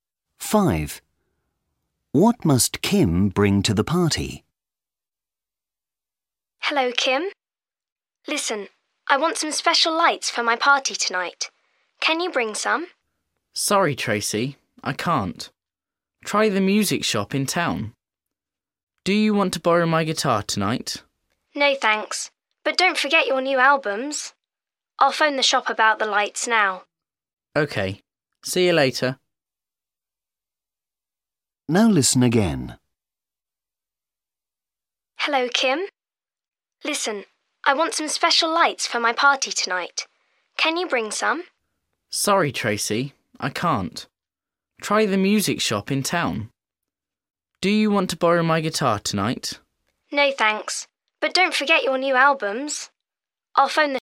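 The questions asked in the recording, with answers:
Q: What must Kim bring to the party?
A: Her new albums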